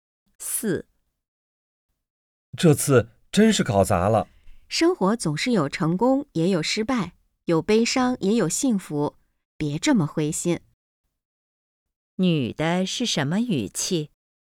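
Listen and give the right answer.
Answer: 安慰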